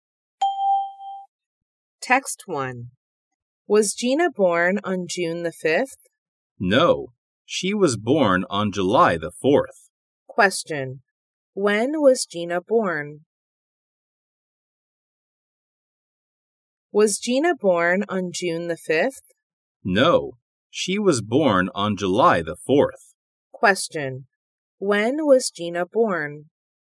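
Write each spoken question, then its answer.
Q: When was Gina born?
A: On July the 4th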